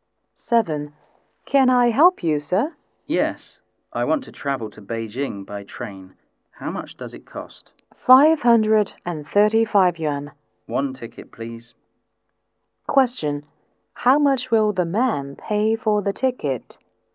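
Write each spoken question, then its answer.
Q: How much will the man pay for the ticket?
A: 535 yuan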